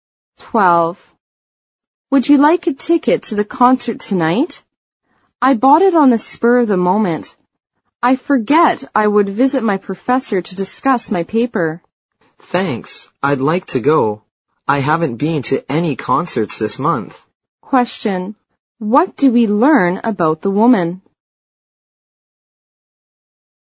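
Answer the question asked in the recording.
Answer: She bought the concert ticket on impulse but can't go because she has to see her professor about her paper.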